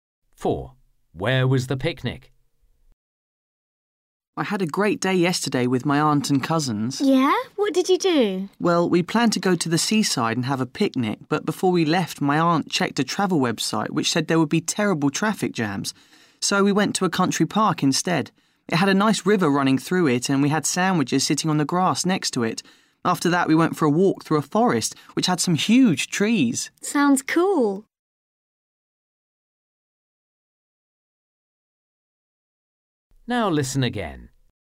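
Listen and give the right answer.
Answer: next to a river in a country park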